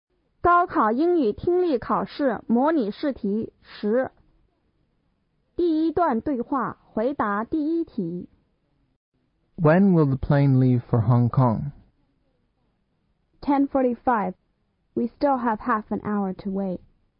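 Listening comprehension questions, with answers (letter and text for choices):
第一节:听下面五段对话。每段对话后有一个问题。从题中所给的A,B,C选项中选出最佳的选项。每段对话只听一遍。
At what time did the conversation take place?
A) 10:15.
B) 10:30.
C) 10:45.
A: A) 10:15.

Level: 高考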